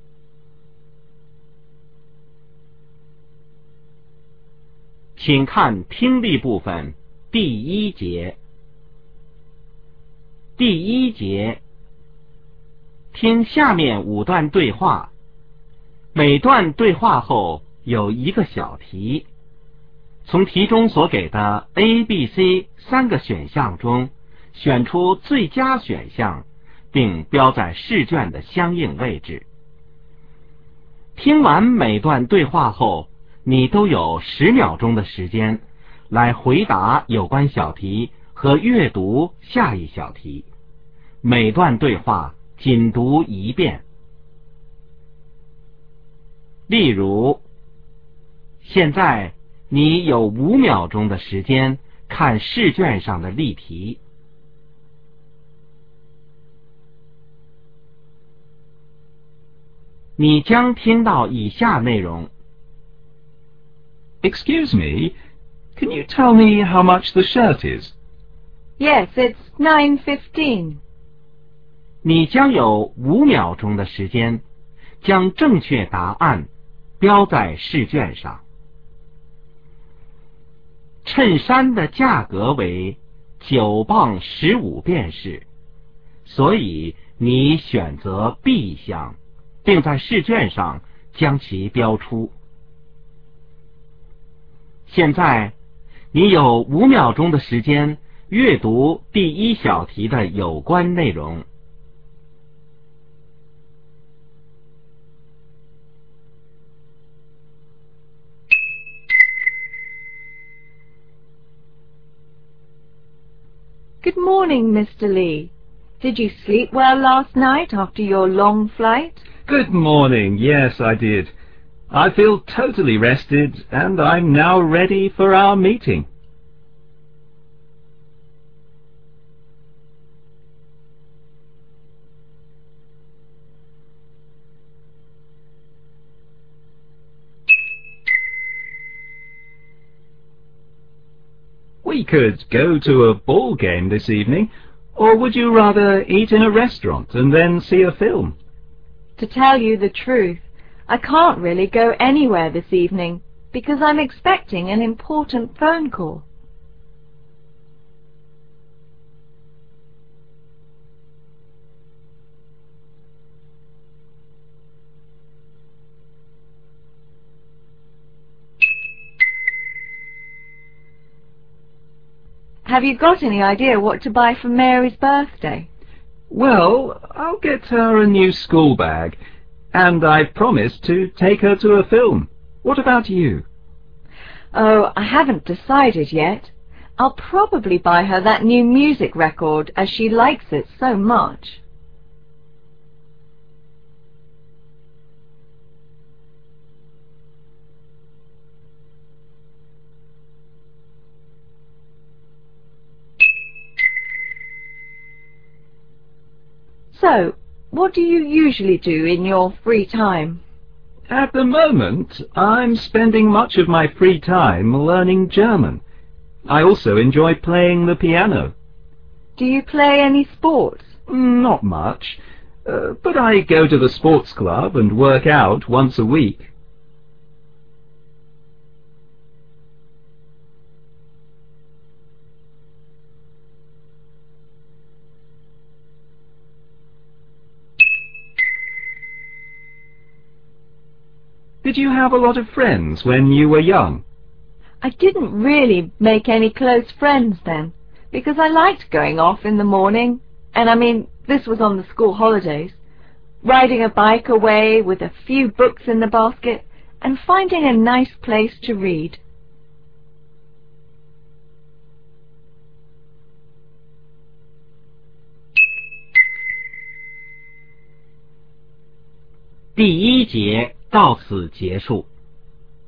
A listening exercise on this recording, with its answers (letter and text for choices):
听下面5段对话。每段对话后有一个小题,从题中所给的A、B、C三个选项中选出最佳选项,并标在试卷的相应位置。听完每段对话后,你都有10秒钟的时间来回答有关小题和阅读下一小题。每段对话仅读一遍。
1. What do we learn about the man?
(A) He slept well on the plane.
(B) He had a long trip.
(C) He had a meeting.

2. Why will the woman stay home in the evening?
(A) To wait for a call.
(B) To watch a ball game on TV.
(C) To have dinner with a friend.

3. What gift will the woman probably get for Mary?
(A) A school bag.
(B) A record.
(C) A theatre ticket.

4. What does the man mainly do in his spare time?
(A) Learn a language.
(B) Do some sports.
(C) Play the piano.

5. What did the woman like doing when she was young?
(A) Riding a bicycle with friends.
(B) Travelling the country.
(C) Reading alone.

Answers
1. (B) He had a long trip.
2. (A) To wait for a call.
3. (B) A record.
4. (A) Learn a language.
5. (C) Reading alone.